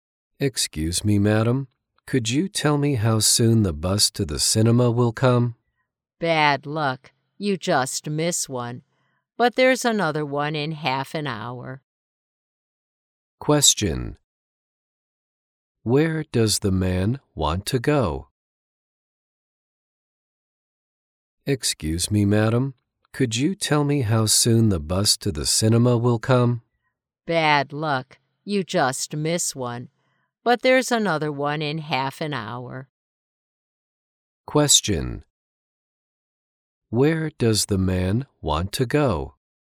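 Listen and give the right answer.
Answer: To the cinema.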